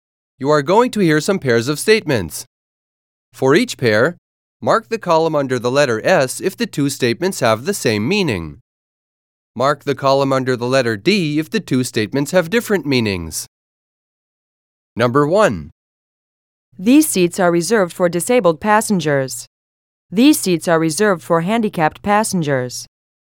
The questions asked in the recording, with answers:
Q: These seats are reserved for handicapped passengers.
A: Same is the correct answer.